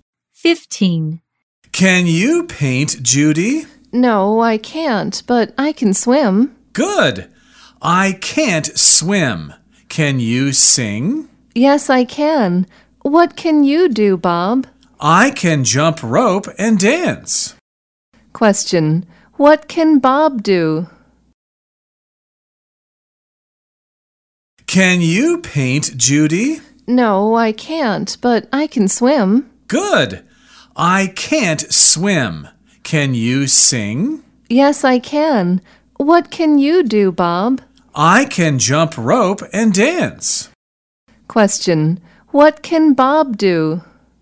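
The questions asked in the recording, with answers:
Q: Question, what can Bob do?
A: He can jump rope and dance.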